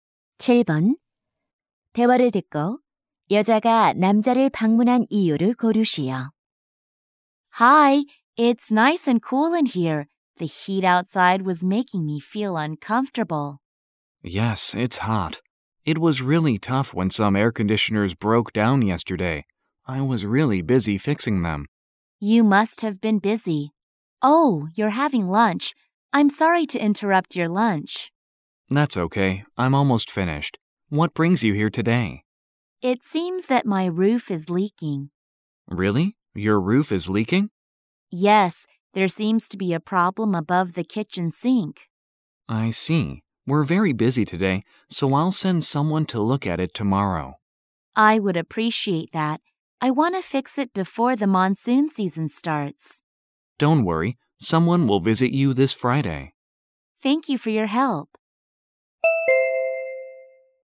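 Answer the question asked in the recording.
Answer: 지붕이 새서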